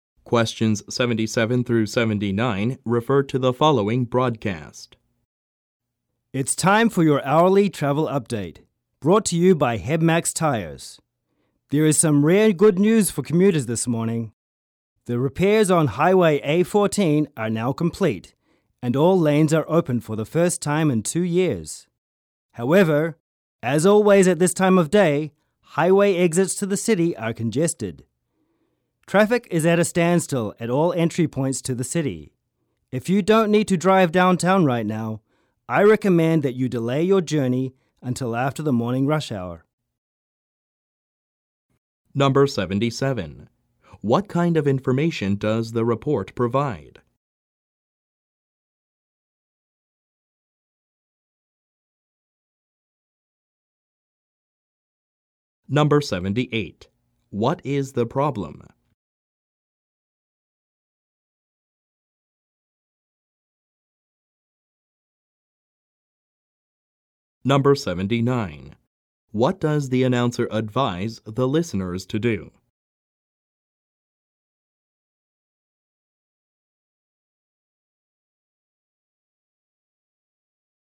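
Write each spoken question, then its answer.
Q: What kind of information does the report provide?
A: Traffic information

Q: What is the problem?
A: Highway exits to the city are congested; traffic is at a standstill

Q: What does the announcer advise the listeners to do?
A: Delay their journey until after the morning rush hour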